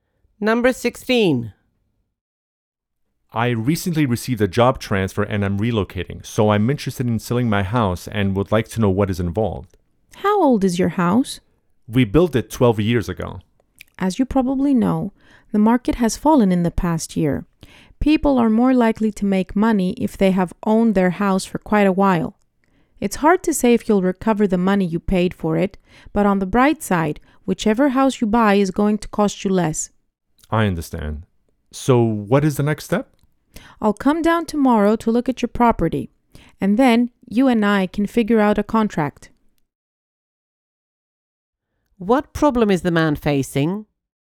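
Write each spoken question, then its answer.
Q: What problem is the man facing?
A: He may not recover what he paid for his house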